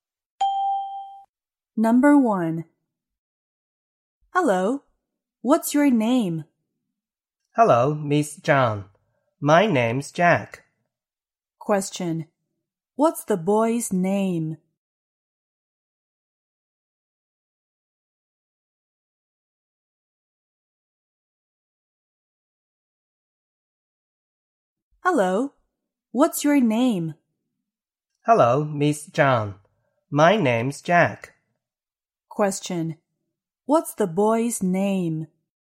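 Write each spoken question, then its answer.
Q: What's the boy's name?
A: Jack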